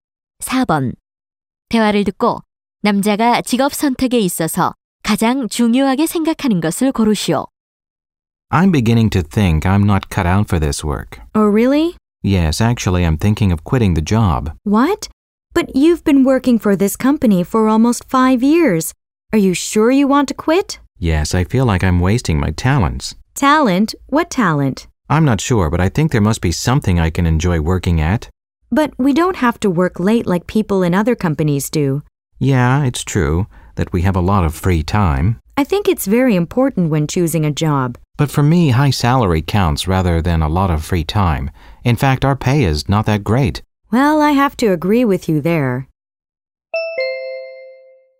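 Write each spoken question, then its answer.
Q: 대화를 듣고 남자가 직업 선택에 있어서 가장 중요하게 생각하는 것을 고르시오.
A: 높은 급여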